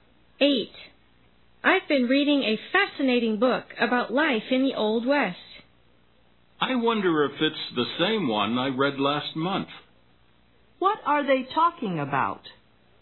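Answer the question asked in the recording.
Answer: A book about life in the Old West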